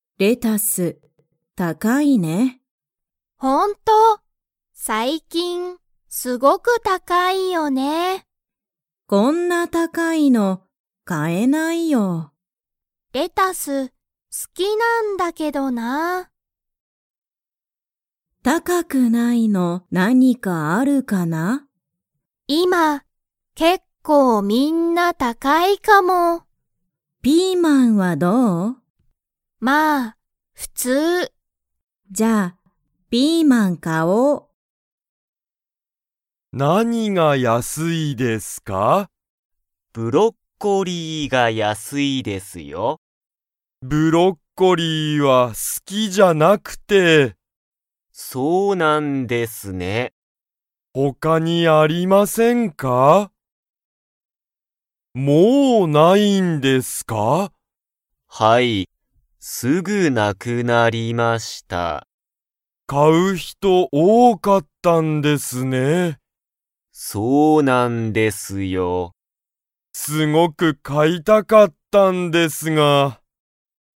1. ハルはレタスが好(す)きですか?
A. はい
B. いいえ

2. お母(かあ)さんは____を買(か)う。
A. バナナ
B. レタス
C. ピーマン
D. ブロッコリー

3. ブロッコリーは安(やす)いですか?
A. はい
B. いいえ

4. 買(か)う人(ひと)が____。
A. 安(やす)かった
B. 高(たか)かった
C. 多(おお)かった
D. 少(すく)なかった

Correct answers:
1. A
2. C
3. A
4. C

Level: Level 1

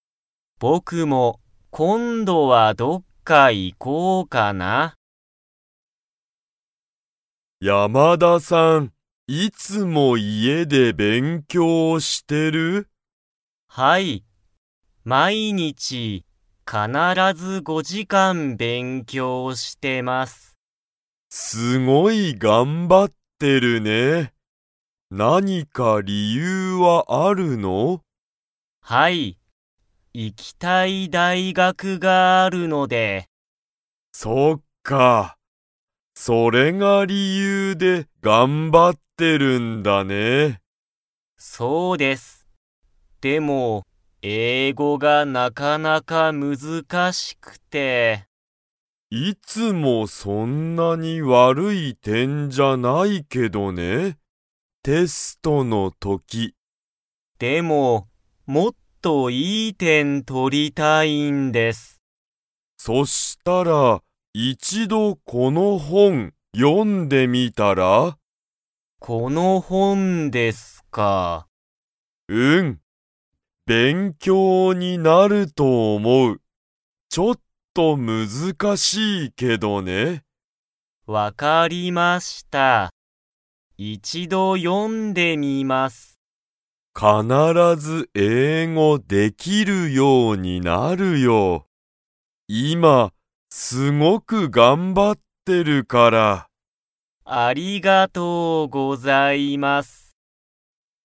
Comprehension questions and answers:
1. 山田(やまだ)さんは、行(い)きたい____がある。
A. 家(いえ)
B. 勉強(べんきょう)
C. 大学(だいがく)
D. 店(みせ)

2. 山田(やまだ)さんは、その本(ほん)を読(よ)んでみますか?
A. はい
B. いいえ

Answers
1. C
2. A

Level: Level 2

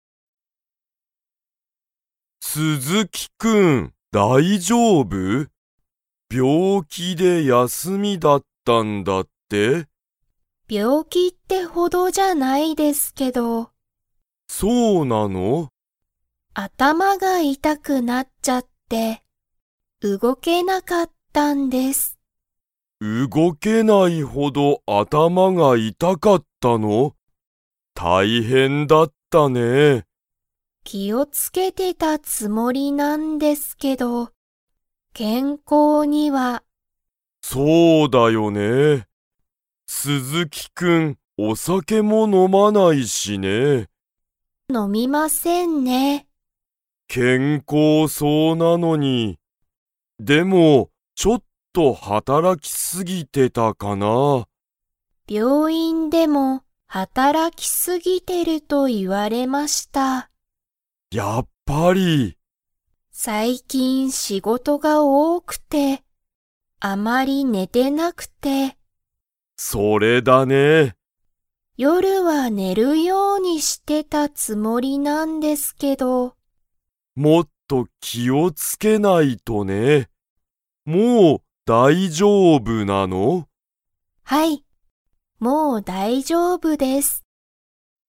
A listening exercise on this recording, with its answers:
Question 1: 鈴木すずきさんは、お酒さけを 。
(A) 飲のむ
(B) 飲のまない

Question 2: 鈴木すずきさんは、最近さいきん何なにが多おおかったですか?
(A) 雨あめ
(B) 仕事しごと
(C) 病気びょうき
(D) 夜よる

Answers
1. B
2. B

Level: Level 3

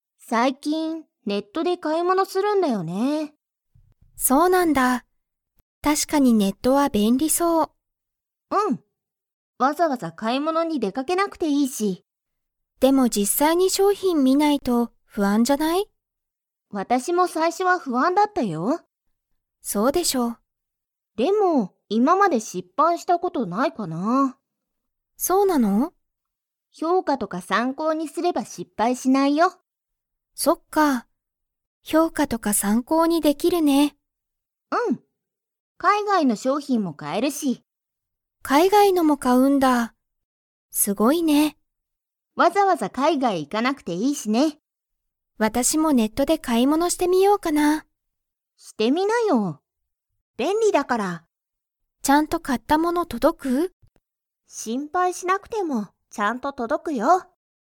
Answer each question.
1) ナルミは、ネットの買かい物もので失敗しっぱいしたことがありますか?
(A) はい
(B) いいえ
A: B

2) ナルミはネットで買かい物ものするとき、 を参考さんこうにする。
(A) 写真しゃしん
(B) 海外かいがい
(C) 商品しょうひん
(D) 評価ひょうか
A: D

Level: Level 4

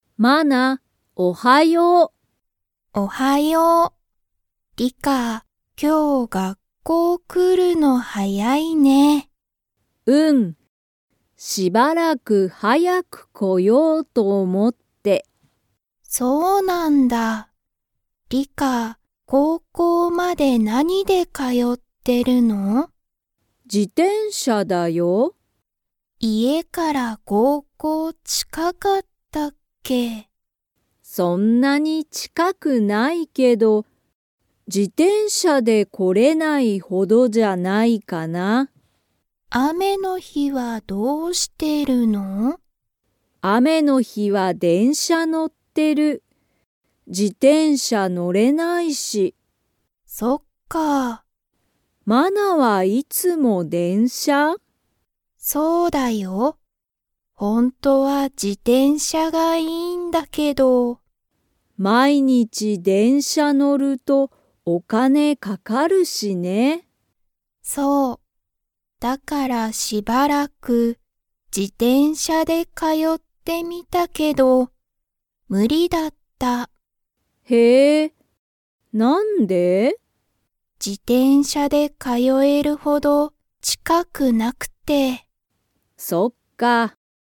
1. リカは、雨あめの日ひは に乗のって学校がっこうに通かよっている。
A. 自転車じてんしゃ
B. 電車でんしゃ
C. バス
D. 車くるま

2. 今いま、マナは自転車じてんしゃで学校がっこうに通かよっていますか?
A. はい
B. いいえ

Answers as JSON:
{"1": "B", "2": "B"}

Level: Level 3

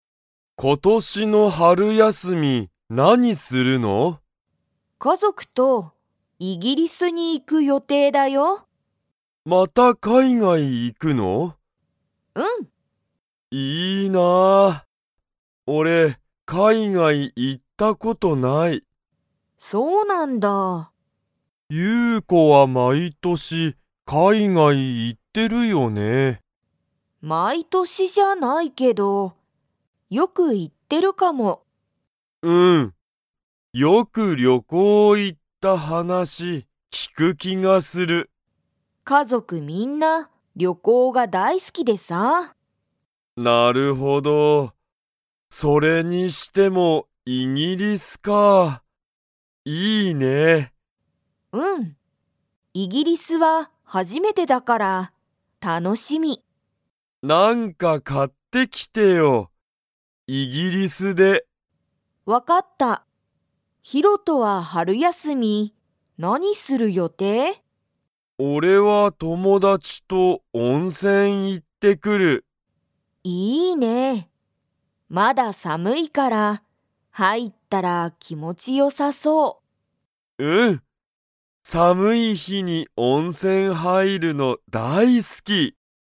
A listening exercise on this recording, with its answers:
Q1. ユウコは毎年まいとし、海外かいがいに行いってますか?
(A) はい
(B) いいえ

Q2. ヒロトは春休はるやすみに に行いってくる。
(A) 友達ともだちの家いえ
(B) 温泉おんせん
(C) 海外かいがい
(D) 寒さむくない所ところ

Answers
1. B
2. B

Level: Level 4

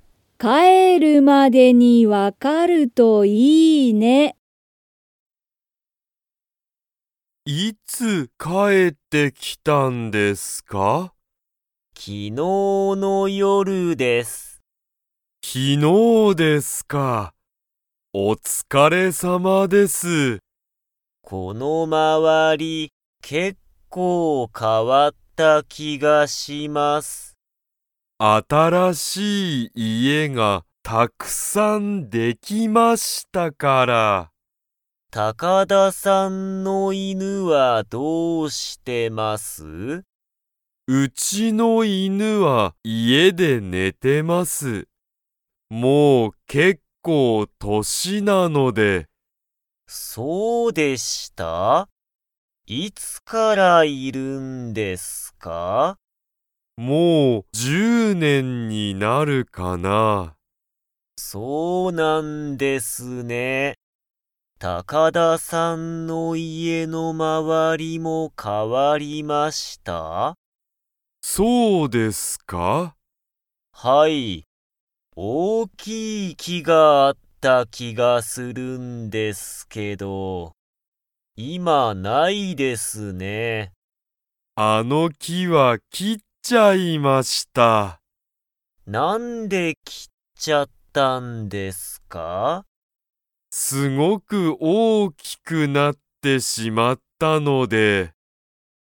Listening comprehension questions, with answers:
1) 上野(うえの)さんは、今日帰(きょうかえ)ってきましたか?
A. はい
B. いいえ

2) 高田(たかだ)さんの犬(いぬ)は、____で寝(ね)ている。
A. 木(き)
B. 夜(よる)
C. 家(いえ)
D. まわり))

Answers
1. B
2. C

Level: Level 2

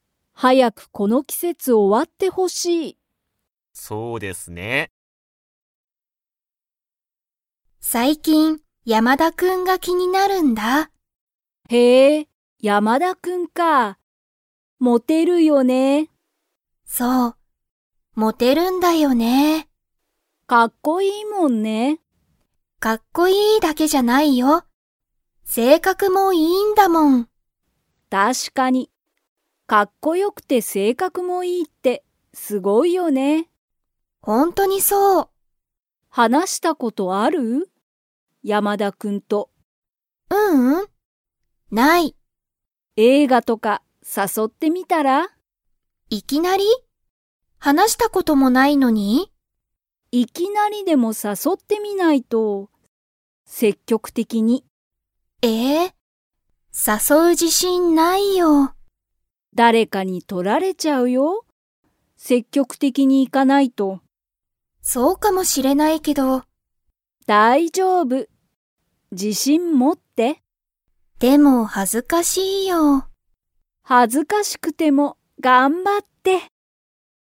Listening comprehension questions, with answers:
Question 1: 山田やまだくんは 。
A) かっこいいし、性格せいかくもいい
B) かっこいいけど、性格せいかくは悪わるい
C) かっこよくないけど、性格せいかくはいい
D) かっこよくないし、性格せいかくも悪わるい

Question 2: メグミは、山田やまだくんを映画えいがに誘さそう自信じしんがありますか?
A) はい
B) いいえ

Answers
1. A
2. B

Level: Level 4

